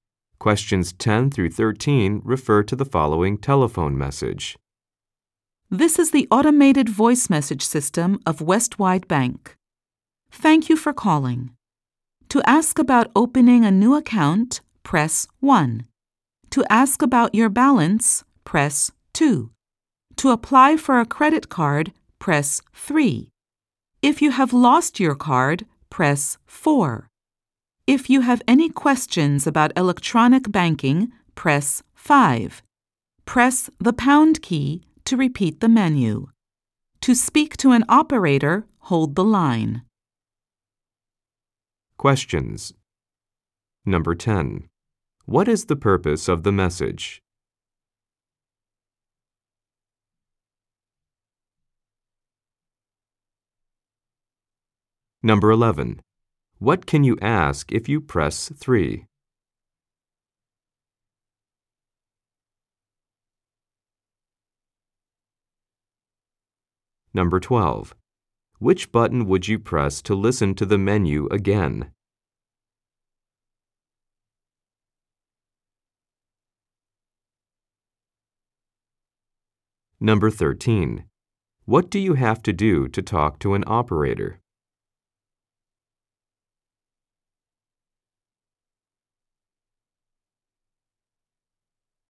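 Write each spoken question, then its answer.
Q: What is the purpose of the message?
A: To direct callers to bank services through a phone menu

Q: What can you ask if you press 3?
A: How to apply for a credit card

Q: Which button would you press to listen to the menu again?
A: The pound key

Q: What do you have to do to talk to an operator?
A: Hold the line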